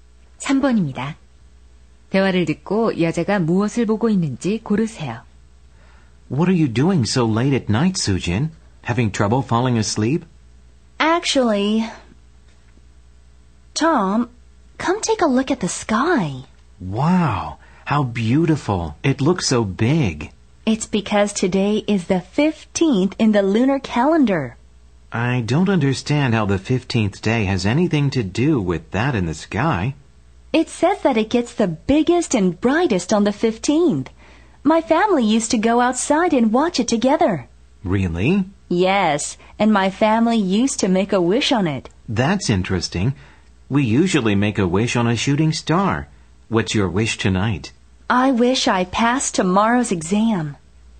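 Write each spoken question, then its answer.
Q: 대화를 듣고 여자가 무엇을 보고 있는지 고르세요.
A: 보름달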